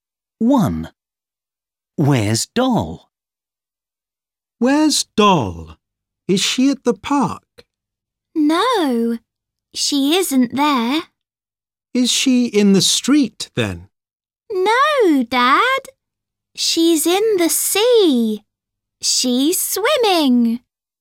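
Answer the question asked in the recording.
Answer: In the sea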